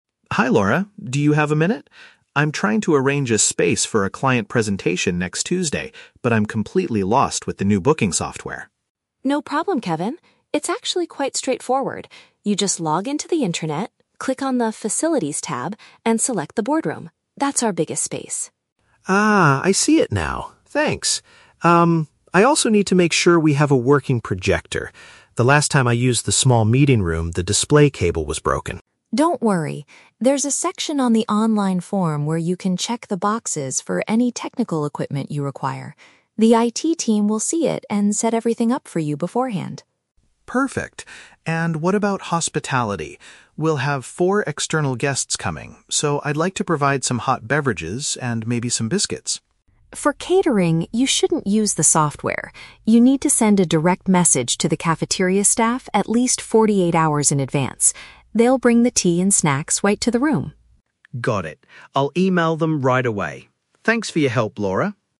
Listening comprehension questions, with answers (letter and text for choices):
Listen to the conversation between an employee and an administrative staff member, then choose the correct answer (A, B, or C).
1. What is Kevin's main problem at the beginning of the conversation?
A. He does not know how to operate the updated reservation program.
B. He forgot his password to log into the company's intranet.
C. He cannot find the physical location of the main boardroom.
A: A. He does not know how to operate the updated reservation program.

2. How can Kevin ensure he has the necessary technology for his presentation?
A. By sending a direct email to the IT support team to ask for help.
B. By selecting the required items directly on the online booking form.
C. By repairing the broken display cable in the small meeting room himself.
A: B. By selecting the required items directly on the online booking form.

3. What is the correct procedure for ordering food and drinks for the guests?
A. He must request them through the same digital reservation system.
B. He needs to buy the snacks himself and bring them to the meeting.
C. He should contact the cafeteria workers directly to make a request.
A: C. He should contact the cafeteria workers directly to make a request.

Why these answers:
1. Kevin states that he is "completely lost with the new booking software". Option A paraphrases this perfectly as not knowing how to "operate the updated reservation program".
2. Laura tells him to "check the boxes for any technical equipment you require" on the online form. Option B uses synonyms ("selecting the required items") to express this action.
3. Laura says he needs to "send a direct message to the cafeteria staff". Option C paraphrases this as "contact the cafeteria workers directly".

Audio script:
Kevin: Hi Laura, do you have a minute? I'm trying to arrange a space for a client presentation next Tuesday, but I'm completely lost with the new booking software.
Laura: No problem, Kevin. It's actually quite straightforward. You just log into the intranet, click on the 'Facilities' tab, and select the 'Boardroom'. That's our biggest space.
Kevin: Ah, I see it now. Thanks. Um, I also need to make sure we have a working projector. The last time I used the small meeting room, the display cable was broken.
Laura: Don't worry. There's a section on the online form where you can check the boxes for any technical equipment you require. The IT team will see it and set everything up for you beforehand.
Kevin: Perfect. And what about hospitality? We'll have four external guests coming, so I'd like to provide some hot beverages and maybe some biscuits.
Laura: For catering, you shouldn't use the software. You need to send a direct message to the cafeteria staff at least 48 hours in advance. They'll bring the tea and snacks right to the room.